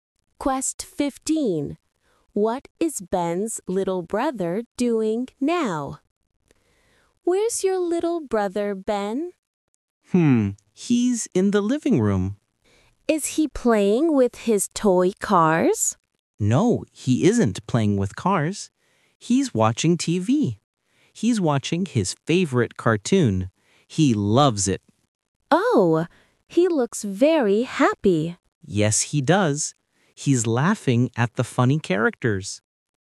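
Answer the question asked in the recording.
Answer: Watching TV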